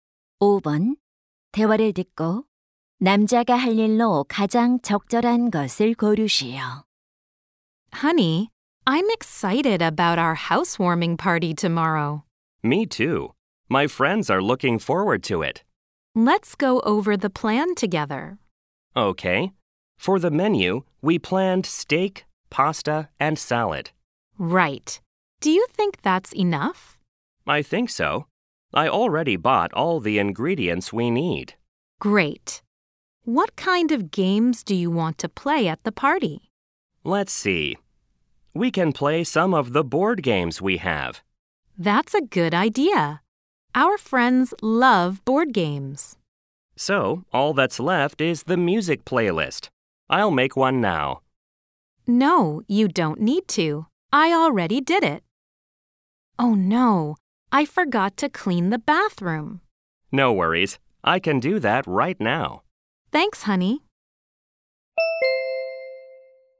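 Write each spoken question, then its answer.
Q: 대화를 듣고 남자가 할 일로 가장 적절한 것을 고르시오.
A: 욕실 청소하기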